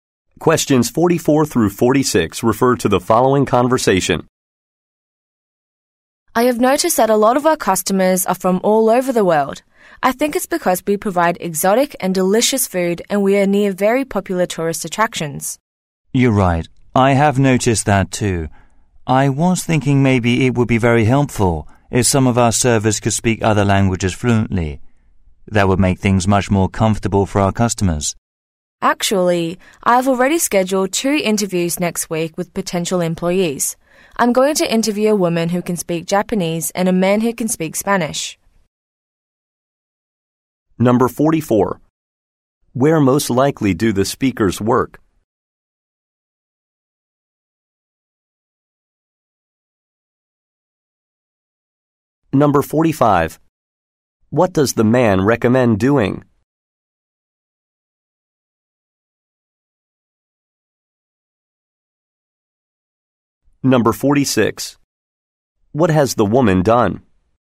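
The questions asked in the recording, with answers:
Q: Where most likely do the speakers work?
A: At a restaurant

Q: What does the man recommend doing?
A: Having servers who speak other languages fluently

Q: What has the woman done?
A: Scheduled interviews with potential employees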